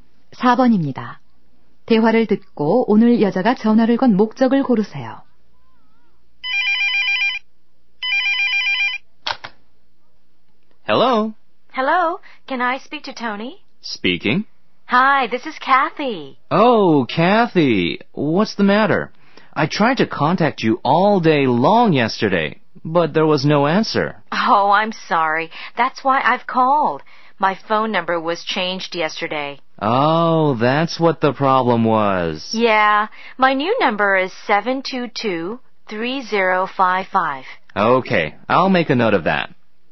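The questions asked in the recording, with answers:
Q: 대화를 듣고 오늘 여자가 전화를 건 목적을 고르세요.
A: 바뀐 전화번호를 알려 주려고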